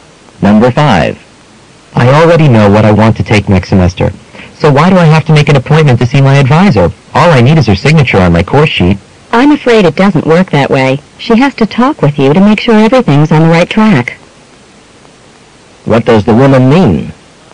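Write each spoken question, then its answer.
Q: What does the woman mean?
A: He must meet the advisor to discuss his courses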